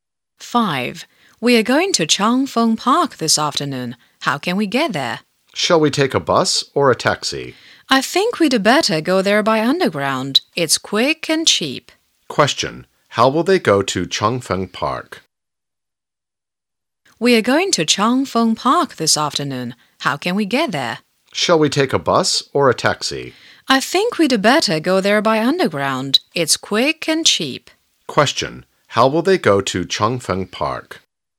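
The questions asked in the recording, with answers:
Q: Question. How will they go to Changfeng Park?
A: By underground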